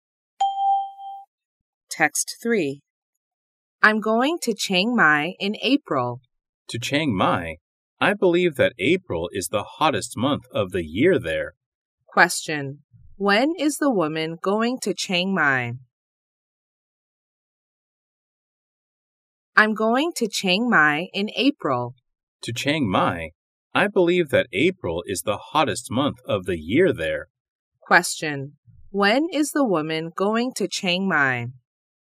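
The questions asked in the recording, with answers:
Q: When is the woman going to Chiang Mai?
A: In April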